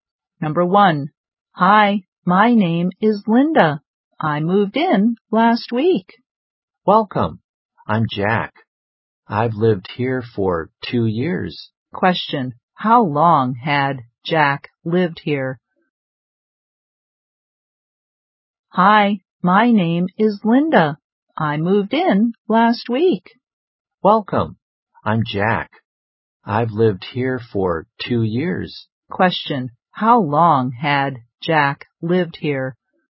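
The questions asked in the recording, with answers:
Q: how long had Jack lived here?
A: For 2 years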